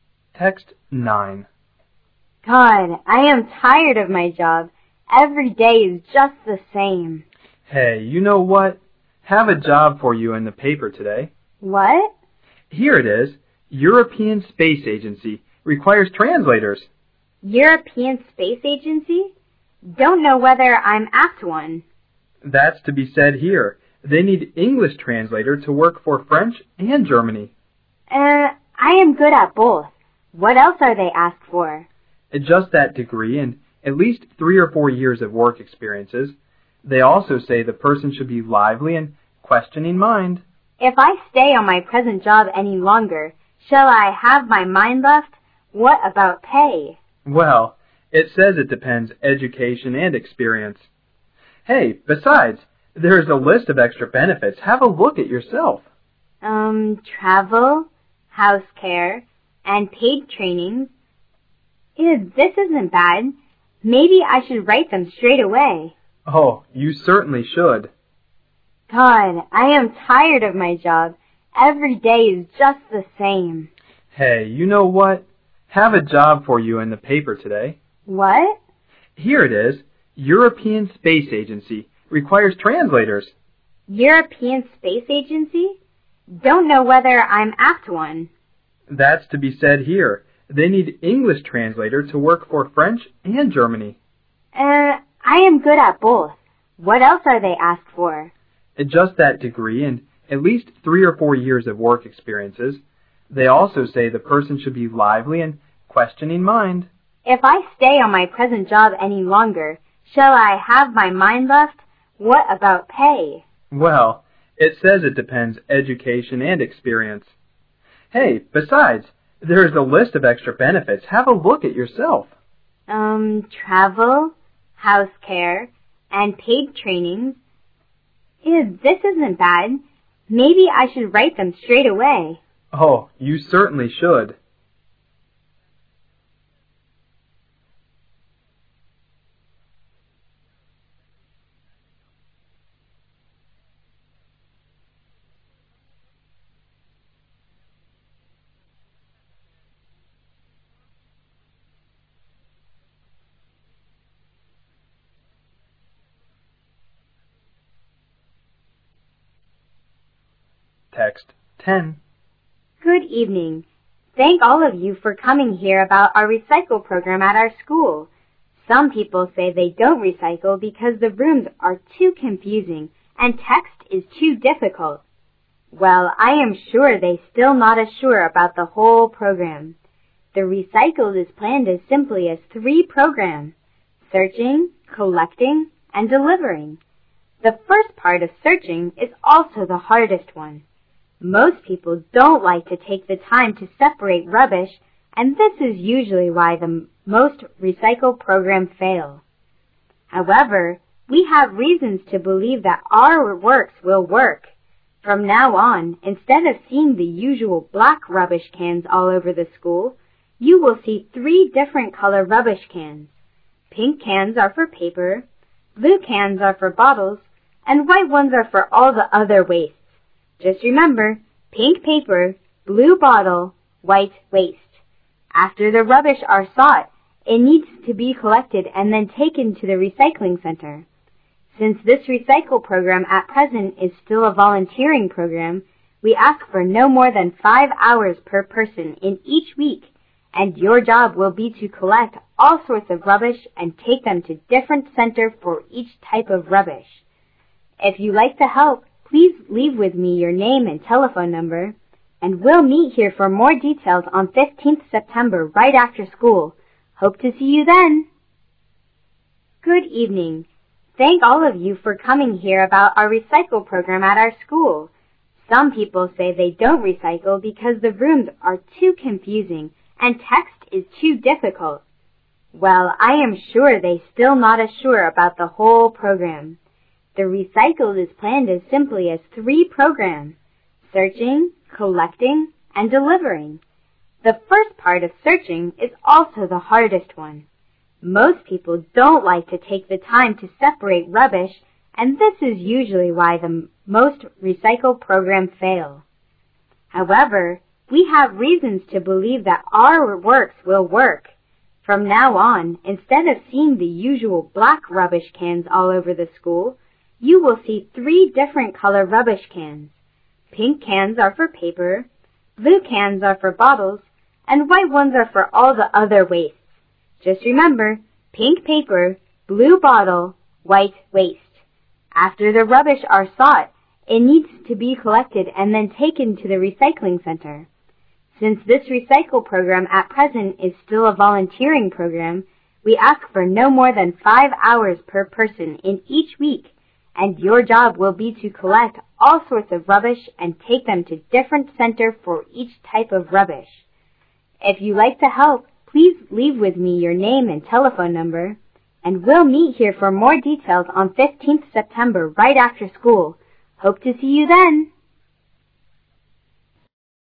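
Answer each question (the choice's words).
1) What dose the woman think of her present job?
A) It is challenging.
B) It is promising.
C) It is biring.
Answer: It is biring.

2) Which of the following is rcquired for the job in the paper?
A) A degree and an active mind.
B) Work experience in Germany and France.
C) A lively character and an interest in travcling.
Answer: A degree and an active mind.

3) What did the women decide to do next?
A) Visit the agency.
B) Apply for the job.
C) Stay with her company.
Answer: Apply for the job.

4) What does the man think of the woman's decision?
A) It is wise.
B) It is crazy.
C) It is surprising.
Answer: It is wise.

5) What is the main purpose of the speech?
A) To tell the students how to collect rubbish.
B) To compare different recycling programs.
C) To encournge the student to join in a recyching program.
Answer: To encournge the student to join in a recyching program.

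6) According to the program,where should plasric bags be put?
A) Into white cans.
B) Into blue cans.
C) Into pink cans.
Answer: Into white cans.

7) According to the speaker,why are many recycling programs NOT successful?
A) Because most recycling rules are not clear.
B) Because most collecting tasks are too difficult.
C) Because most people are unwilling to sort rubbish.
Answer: Because most people are unwilling to sort rubbish.

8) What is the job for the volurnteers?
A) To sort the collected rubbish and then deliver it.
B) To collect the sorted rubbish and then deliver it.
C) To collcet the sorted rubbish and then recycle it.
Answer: To collect the sorted rubbish and then deliver it.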